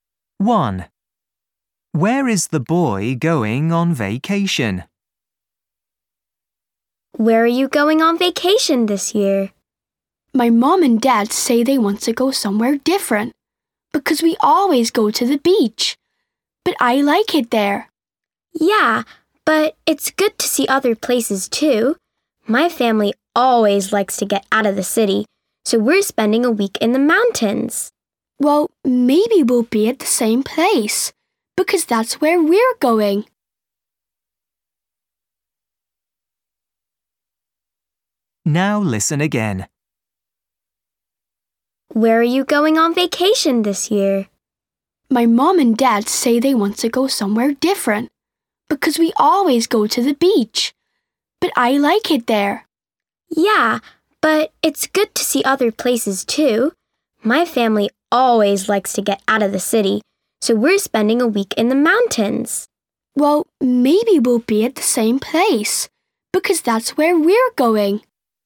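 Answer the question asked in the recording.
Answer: to the mountains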